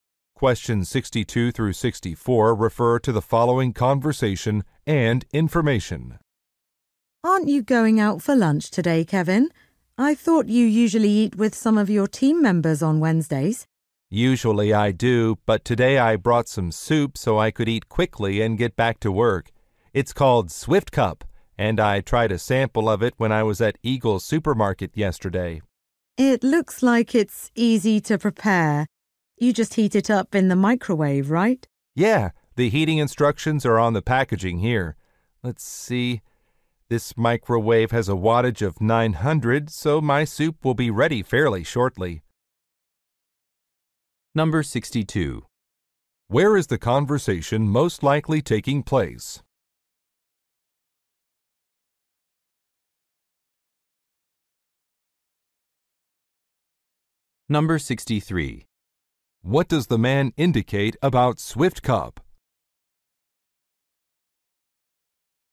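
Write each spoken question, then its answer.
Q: What does the man indicate about Swift Cup?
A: He tried a sample of it at a supermarket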